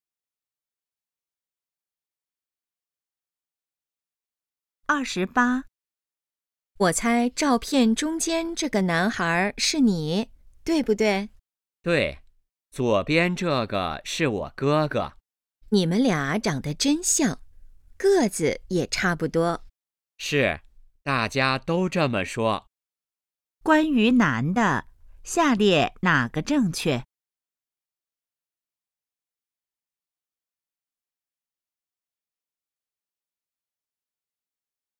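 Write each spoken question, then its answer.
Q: 关于男的,下列哪个正确?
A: 和哥哥长得很像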